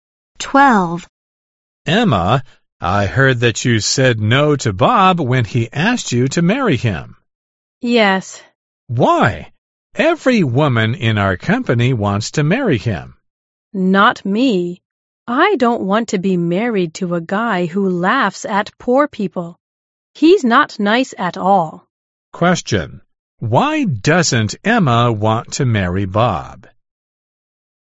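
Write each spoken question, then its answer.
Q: Why doesn't Emma want to marry Bob?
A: Because he laughs at poor people; he's not nice.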